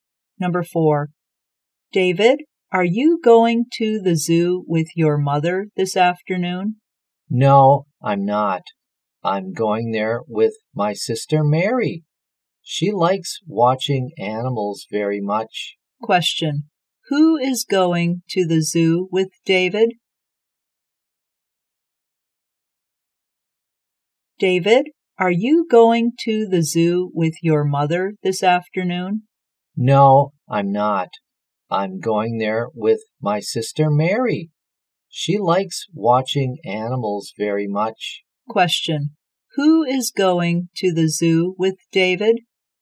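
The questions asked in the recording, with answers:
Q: Who is going to the zoo with David?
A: His sister Mary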